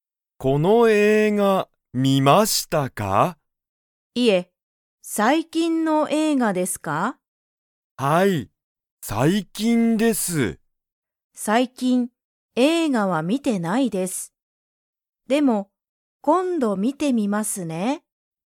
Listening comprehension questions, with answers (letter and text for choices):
鈴木(すずき)さんはその映画(えいが)を見みましたか?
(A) はい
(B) いいえ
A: (B) いいえ

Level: Level 1